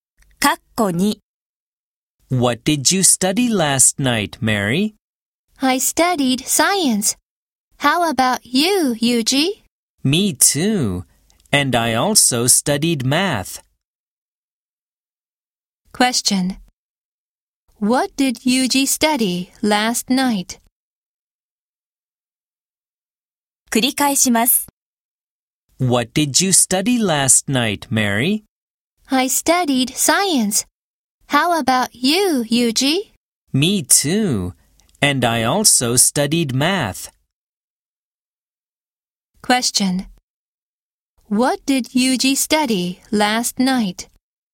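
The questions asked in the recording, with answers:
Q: What did Yuji study last night?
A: Science and math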